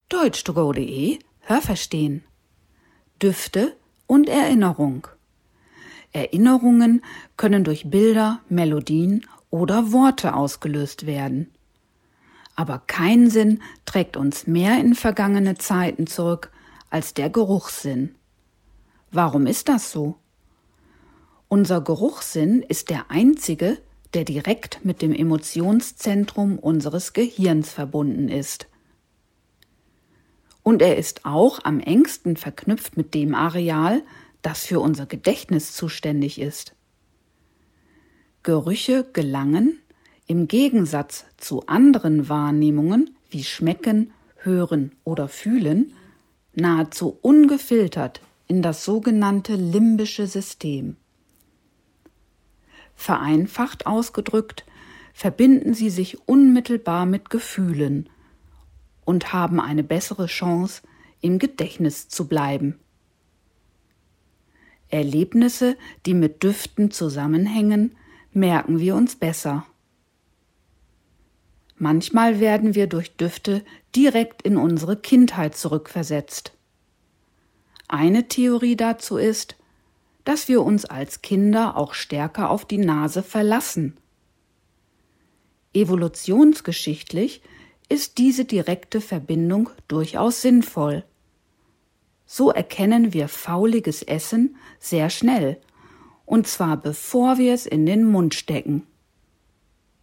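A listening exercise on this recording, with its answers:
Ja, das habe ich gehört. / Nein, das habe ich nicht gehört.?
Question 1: Bilder, Melodien und Worte können Erinnerungen auslösen.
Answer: Ja, das habe ich gehört.

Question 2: Der Geruchssinn ist direkt mit dem Emotionszentrum unseres Gehirns verbunden.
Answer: Ja, das habe ich gehört.

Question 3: Am engsten verknüpft mit dem Areal im Gehirn, das für das Gedächtnis zuständig ist, ist der Gehörsinn.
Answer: Nein, das habe ich nicht gehört.

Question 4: Düfte und Gerüche gelangen über einige Filter in das sogenannte limbische System unseres Gehirns.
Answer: Nein, das habe ich nicht gehört.

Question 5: An Erlebnisse, die mit Gerüchen verbunden sind, können wir uns später besser erinnern.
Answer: Ja, das habe ich gehört.

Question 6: Wahrnehmungen durch unseren Geruchssinn können uns bis in unsere Kindheit zurückversetzen.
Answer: Ja, das habe ich gehört.

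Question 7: Vor verdorbenem Essen schützt uns unser Geschmackssinn am besten.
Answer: Nein, das habe ich nicht gehört.

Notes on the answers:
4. Sie gelangen dorthin fast ungefiltert, d. h. direkt.

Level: B1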